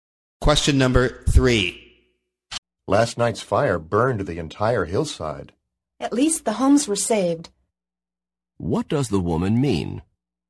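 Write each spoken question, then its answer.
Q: What does the woman mean?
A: The homes weren't burned.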